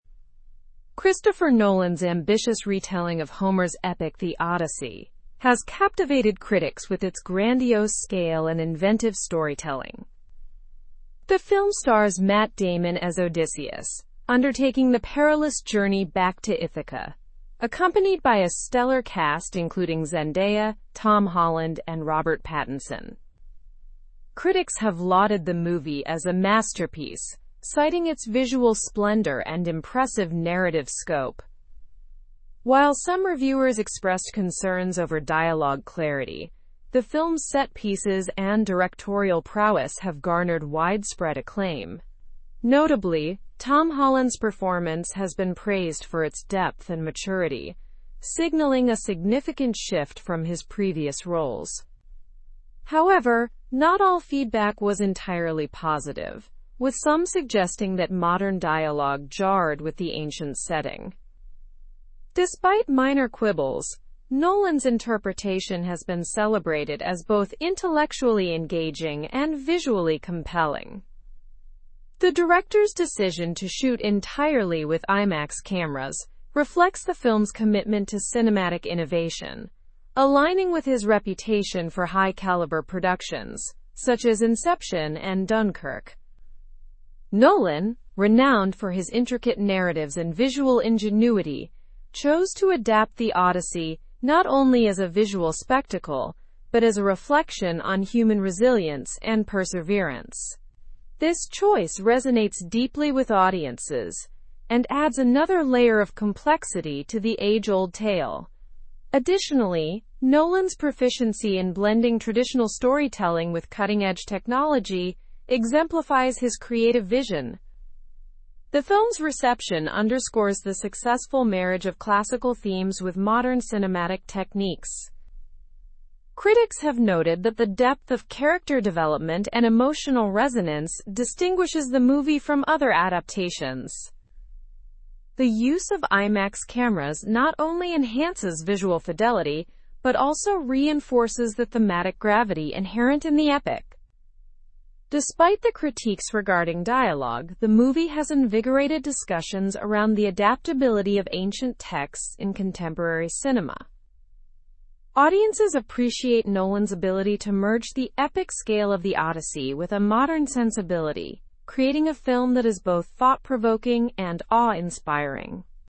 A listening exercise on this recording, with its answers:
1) What is the main theme of the film as envisioned by Nolan?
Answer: Human resilience and perseverance.

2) Which legendary tale is Nolan's latest film based on?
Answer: Homer's epic, The Odyssey.

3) How did critics respond to the visual aspect of the film?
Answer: They lauded its visual splendor and narrative scope.

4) What concerns did some reviewers express about the film?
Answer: Concerns were expressed over dialogue clarity.

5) What has Tom Holland's acting been praised for?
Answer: His performance has been praised for depth and maturity.

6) What filming technique did Nolan employ for this production?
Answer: Nolan shot the film entirely with Imax cameras.

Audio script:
Christopher Nolan's ambitious retelling of Homer's epic, The Odyssey, has captivated critics with its grandiose scale and inventive storytelling. The film stars Matt Damon as Odysseus, undertaking the perilous journey back to Ithaca, accompanied by a stellar cast including Zendaya, Tom Holland, and Robert Pattinson. Critics have lauded the movie as a 'masterpiece', citing its visual splendor and impressive narrative scope. While some reviewers expressed concerns over dialogue clarity, the film's set pieces and directorial prowess have garnered widespread acclaim. Notably, Tom Holland's performance has been praised for its depth and maturity, signaling a significant shift from his previous roles.
However, not all feedback was entirely positive, with some suggesting that modern dialogue jarred with the ancient setting. Despite minor quibbles, Nolan's interpretation has been celebrated as both intellectually engaging and visually compelling. The director's decision to shoot entirely with Imax cameras reflects the film's commitment to cinematic innovation, aligning with his reputation for high-caliber productions such as Inception and Dunkirk.
Nolan, renowned for his intricate narratives and visual ingenuity, chose to adapt The Odyssey not only as a visual spectacle but as a reflection on human resilience and perseverance. This choice resonates deeply with audiences and adds another layer of complexity to the age-old tale. Additionally, Nolan's proficiency in blending traditional storytelling with cutting-edge technology exemplifies his creative vision.
The film's reception underscores the successful marriage of classical themes with modern cinematic techniques. Critics have noted that the depth of character development and emotional resonance distinguishes the movie from other adaptations. The use of Imax cameras not only enhances visual fidelity but also reinforces the thematic gravity inherent in the epic.
Despite the critiques regarding dialogue, the movie has invigorated discussions around the adaptability of ancient texts in contemporary cinema.
Show model answerThe movie invigorated discussions around the adaptability of ancient texts in contemporary cinema.
the adaptability of ancient texts in contemporary cinema. Audiences appreciate Nolan's ability to merge the epic scale of The Odyssey with a modern sensibility, ? a film that is both ? and awe-inspiring.

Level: Level 4